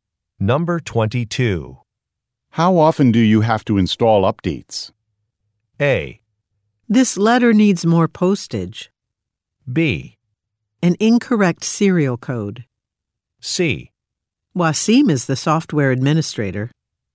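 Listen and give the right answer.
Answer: C: Wasim is the software administrator.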